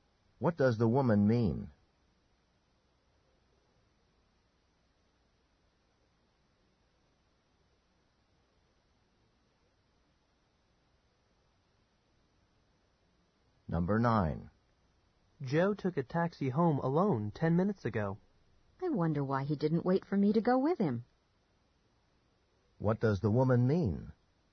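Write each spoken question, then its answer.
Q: What does the woman mean?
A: She expected Joe to wait and share the taxi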